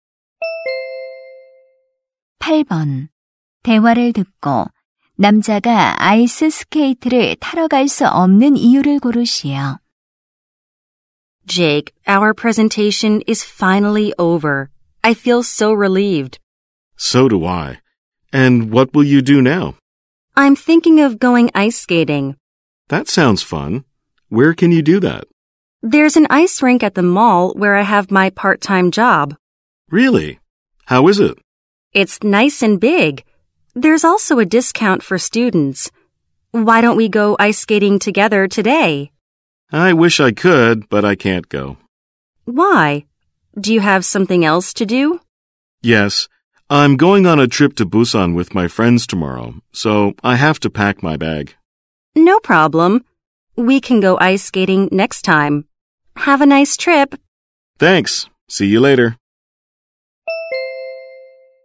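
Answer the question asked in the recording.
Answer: 내일 부산 여행을 위해 짐을 싸야 해서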